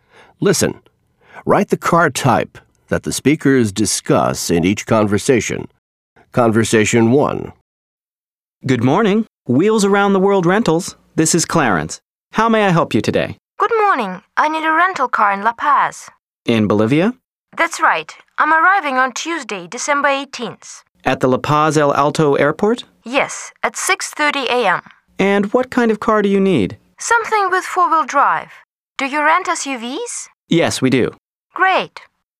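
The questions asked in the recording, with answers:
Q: Listen. Write the car type that the speakers discuss in each conversation.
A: an SUV (four-wheel drive)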